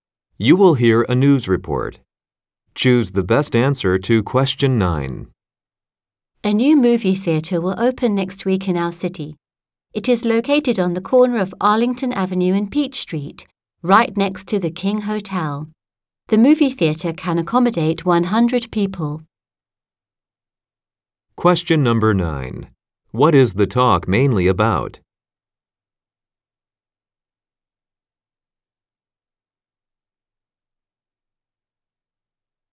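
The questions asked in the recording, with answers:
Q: What is the talk mainly about?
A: A new movie theater opening next week in the city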